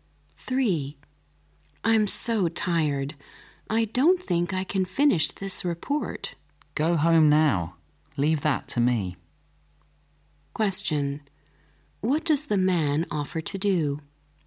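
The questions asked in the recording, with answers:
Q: What does the man offer to do?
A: Finish the report for the woman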